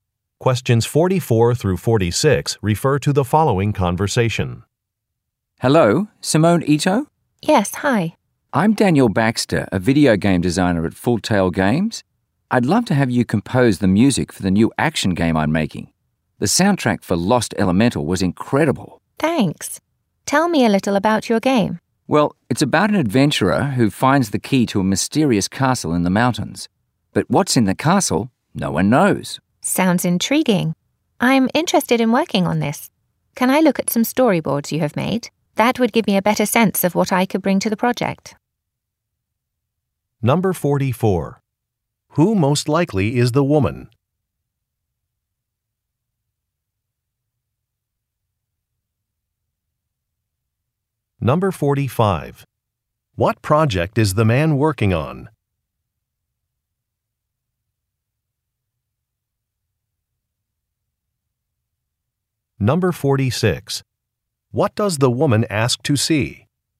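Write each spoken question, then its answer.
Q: Who most likely is the woman?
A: A music composer

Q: What project is the man working on?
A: A video game

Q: What does the woman ask to see?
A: Storyboards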